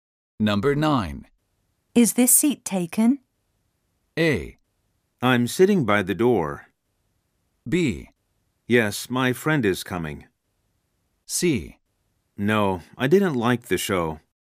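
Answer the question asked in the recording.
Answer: B: Yes, my friend is coming.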